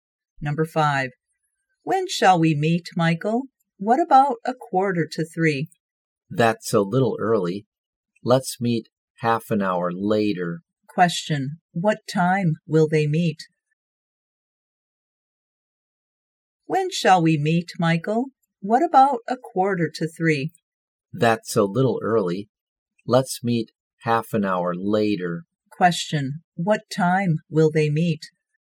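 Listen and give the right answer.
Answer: At 3:45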